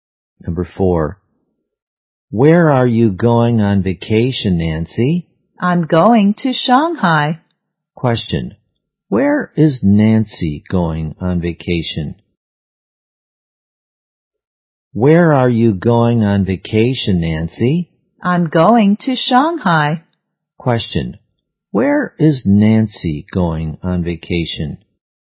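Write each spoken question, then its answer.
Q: Where is Nancy going on vacation?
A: Shanghai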